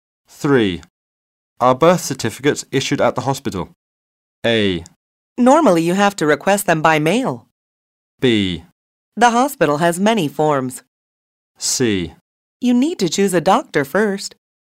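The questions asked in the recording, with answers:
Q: Are birth certificates issued at the hospital?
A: A: Normally you have to request them by mail.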